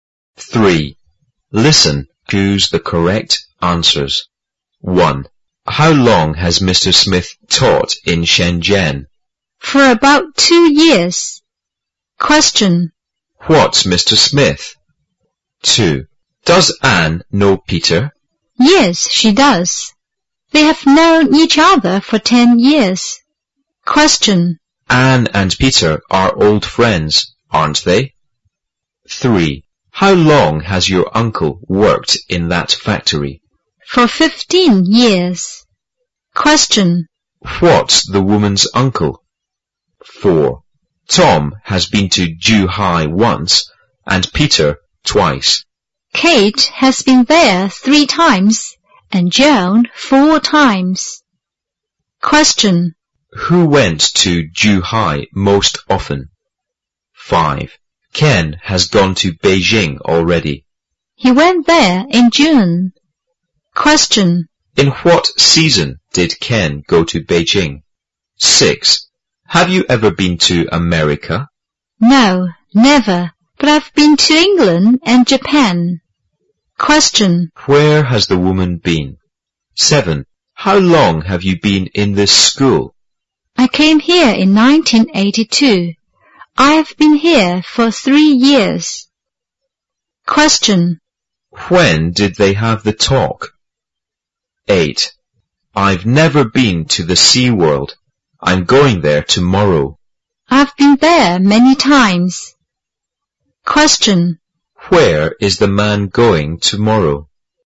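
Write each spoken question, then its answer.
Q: What's Mr. Smith?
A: A teacher

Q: Anne and Peter are old friends, aren't they?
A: Yes, they are

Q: What's the woman's uncle?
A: A factory worker

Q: Who went to Ju Hai most often?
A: Joan

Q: In what season did Ken go to Beijing?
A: Summer

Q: Where has the woman been?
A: England and Japan

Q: When did they have the talk?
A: In 1985

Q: Where is the man going tomorrow?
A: The Sea World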